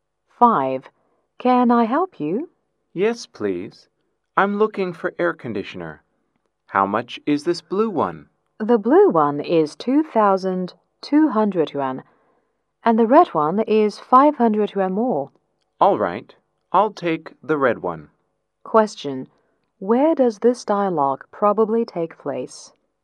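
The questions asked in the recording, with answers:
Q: Where does this dialogue probably take place?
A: In a shop (electrical appliance store)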